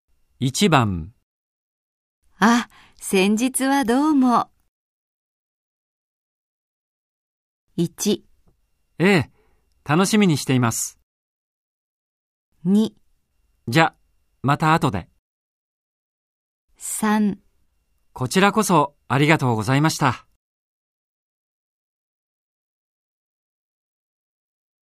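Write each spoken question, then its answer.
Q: あ、先日はどうも。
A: 3: こちらこそありがとうございました。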